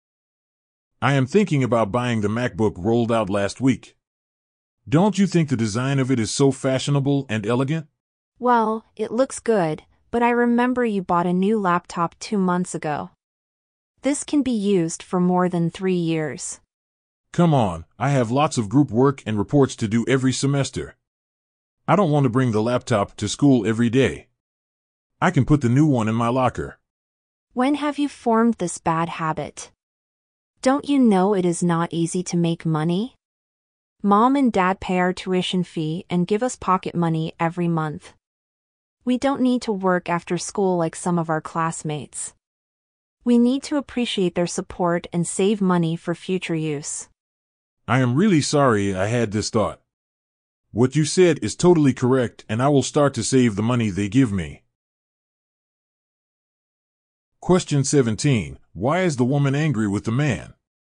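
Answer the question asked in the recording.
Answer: Because he wants to buy another new laptop only 2 months after buying one, wasting their parents' money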